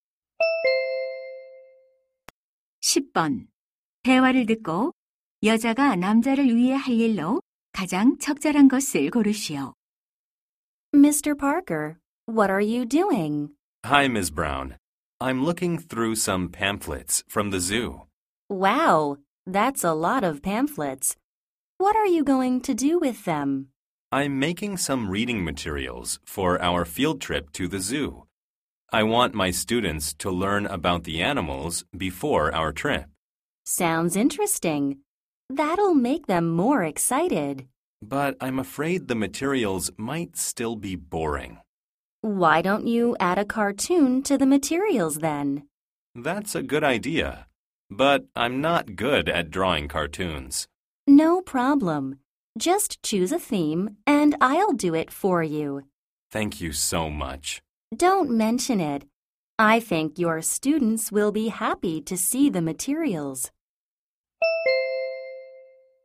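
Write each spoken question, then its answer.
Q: 대화를 듣고 여자가 남자를 위해 할 일로 가장 적절한 것을 고르시오.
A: 자료에 넣을 만화 그리기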